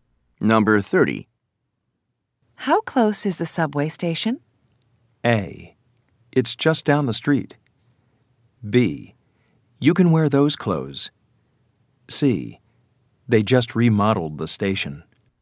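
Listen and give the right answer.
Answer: A: It's just down the street.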